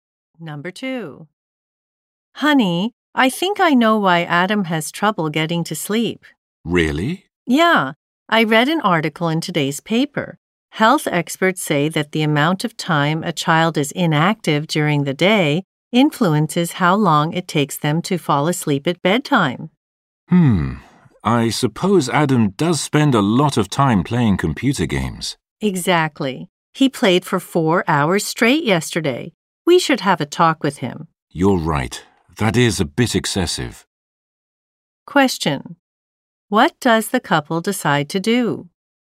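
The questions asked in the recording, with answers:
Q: What does the couple decide to do?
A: Have a talk with Adam about how much time he spends playing computer games.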